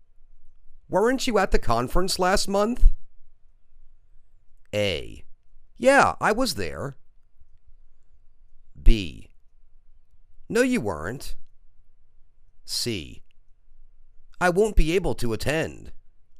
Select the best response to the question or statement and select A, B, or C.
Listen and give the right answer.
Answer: Yeah, I was there.